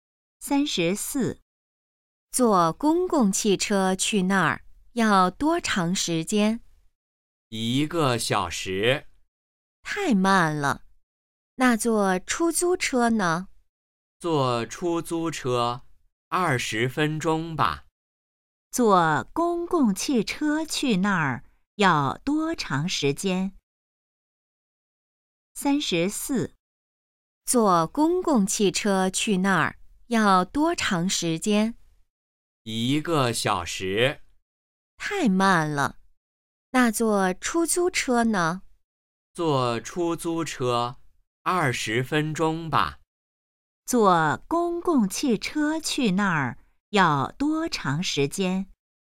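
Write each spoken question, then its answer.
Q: 坐公共汽车去那儿要多长时间?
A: 1个小时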